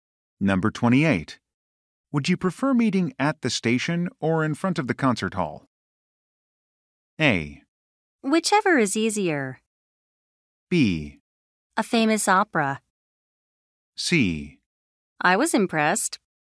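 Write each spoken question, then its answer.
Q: Would you prefer meeting at the station or in front of the concert hall?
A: A: Whichever is easier.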